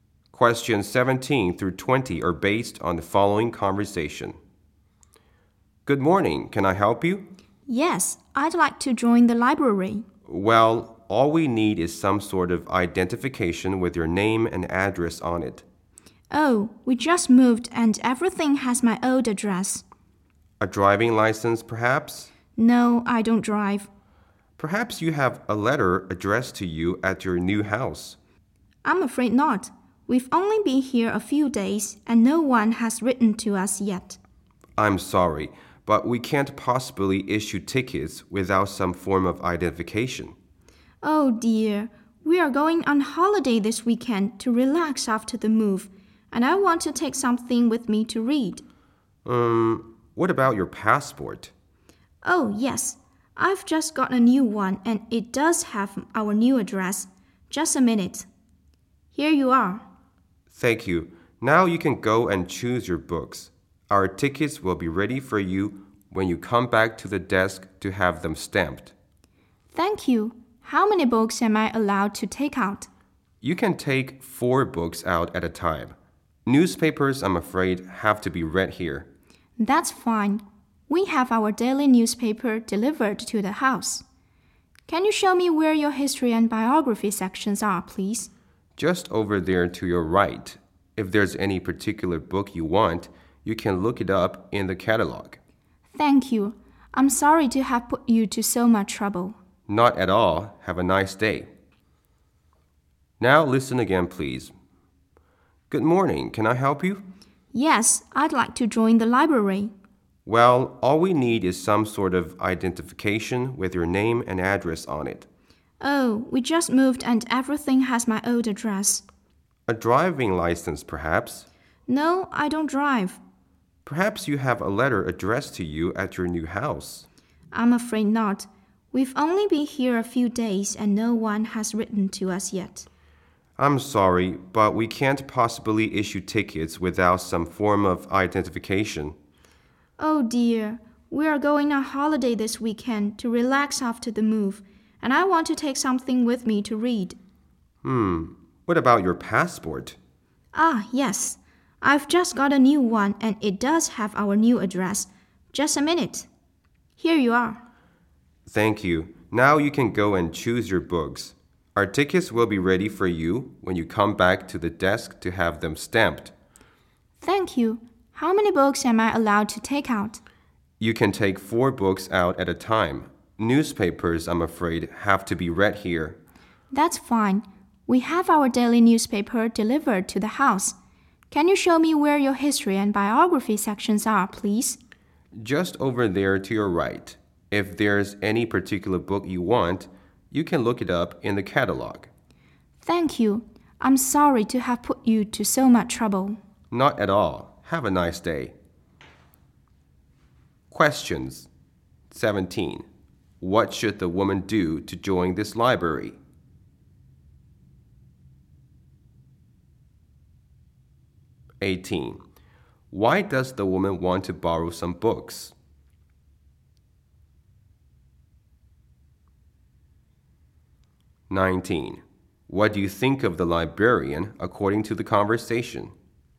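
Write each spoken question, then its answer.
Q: What should the woman do to join this library?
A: Show identification with her name and new address

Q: Why does the woman want to borrow some books?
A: To read on holiday this weekend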